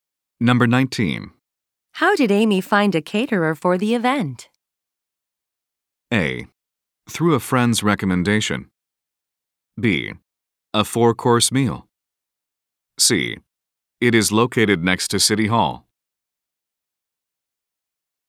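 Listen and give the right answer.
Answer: A: Through a friend's recommendation.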